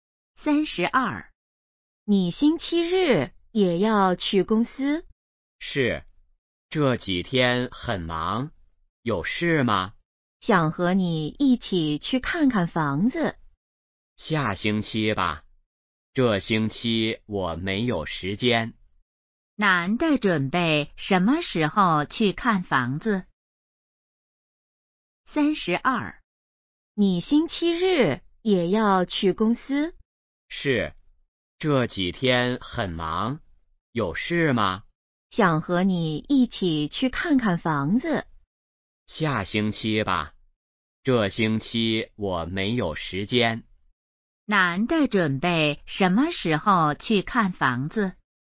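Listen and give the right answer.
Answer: 下星期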